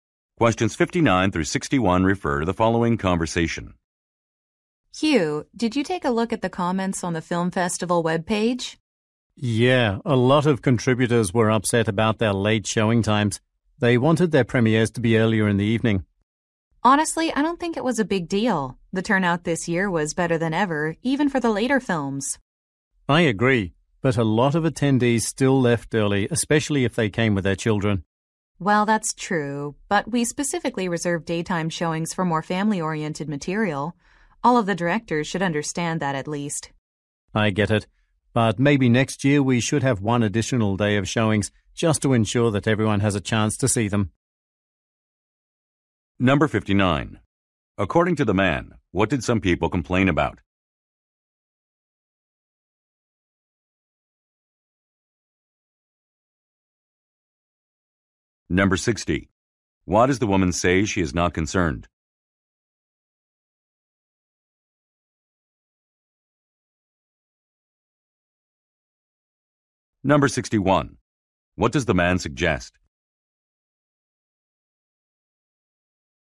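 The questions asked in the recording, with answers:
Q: According to the man, what did some people complain about?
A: Late showing times.

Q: Why does the woman say she is not concerned?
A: Turnout was better than ever.

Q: What does the man suggest?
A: Adding an extra day of showings next year.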